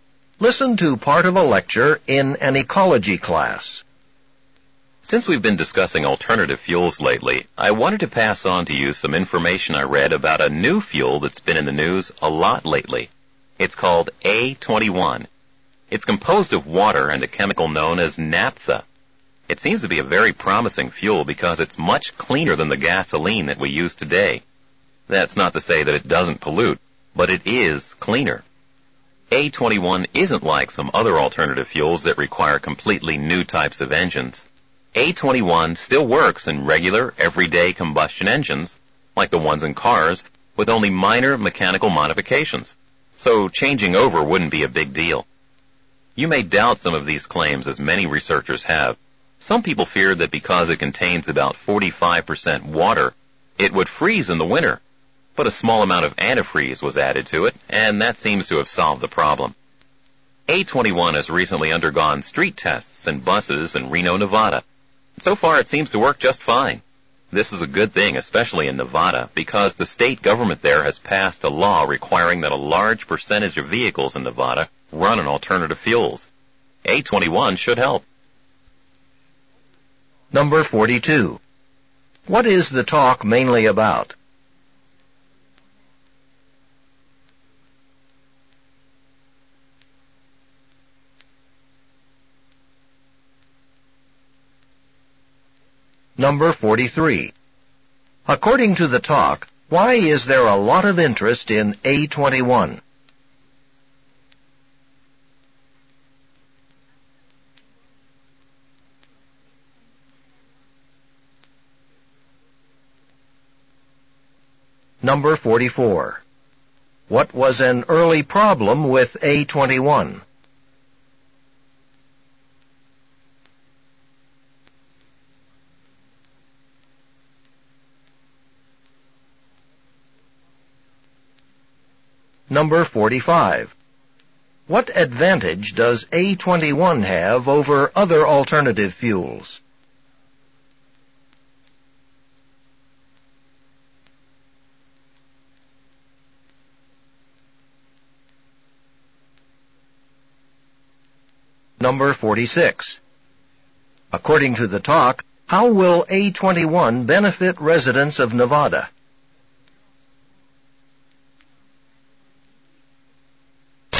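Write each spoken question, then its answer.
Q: What is the talk mainly about?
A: A new alternative fuel, A21

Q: According to the talk, why is there a lot of interest in A21?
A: It is much cleaner than gasoline

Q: What was an early problem with A21?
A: People feared its water content would freeze in winter

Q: What advantage does A21 have over other alternative fuels?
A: It works in regular combustion engines with only minor modifications

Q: According to the talk, how will A21 benefit residents of Nevada?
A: It will help meet the state law requiring many vehicles to run on alternative fuels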